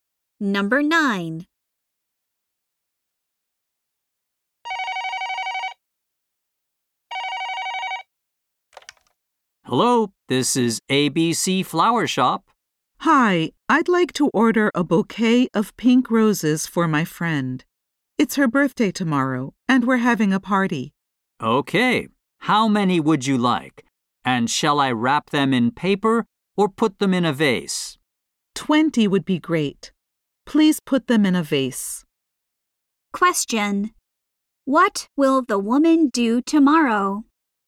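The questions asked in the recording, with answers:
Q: What will the woman do tomorrow?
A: Have a birthday party for her friend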